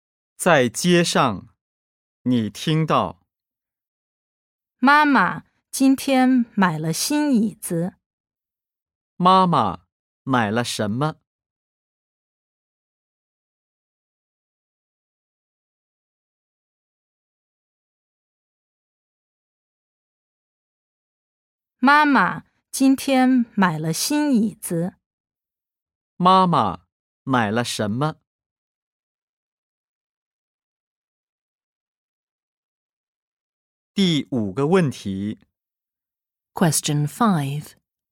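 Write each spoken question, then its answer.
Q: 妈妈买了什么?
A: 新椅子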